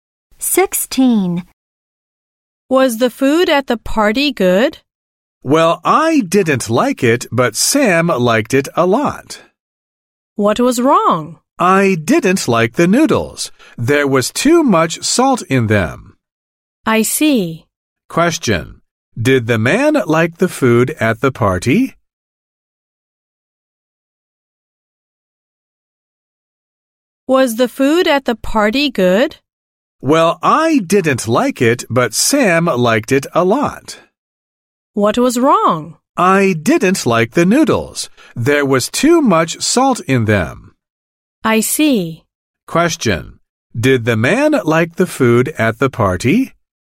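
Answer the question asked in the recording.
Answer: No, there was too much salt in the noodles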